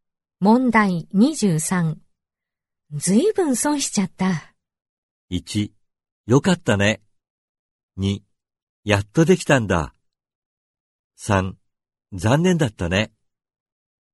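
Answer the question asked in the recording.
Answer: 3: 残念だったね。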